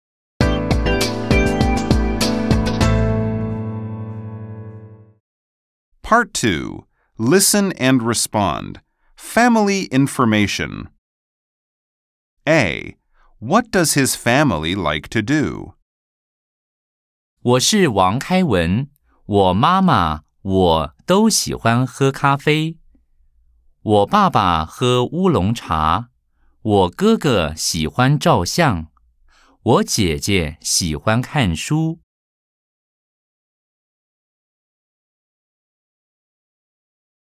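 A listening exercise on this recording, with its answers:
Nghe sau đó dựa vào nội dung đoạn văn trả lời các thông tin đưa trước điền vào ô trống:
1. 王開文 Wáng Kāiwén Vương Khai Văn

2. 他爸爸 tā bàba bố của anh ấy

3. 他媽媽 tā māma mẹ của anh ấy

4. 他哥哥 tā gēge anh trai của anh ấy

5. 他姐姐 tā jiějie chị gái của anh ấy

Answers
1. 喝咖啡
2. 喝烏龍茶
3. 喝咖啡
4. 照相
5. 看書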